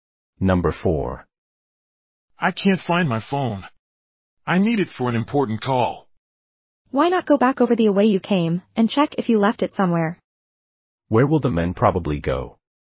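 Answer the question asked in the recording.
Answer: Back along the way he came to look for his phone.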